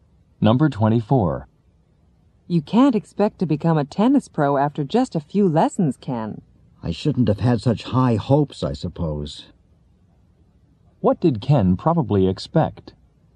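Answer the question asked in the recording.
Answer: To become a tennis pro quickly.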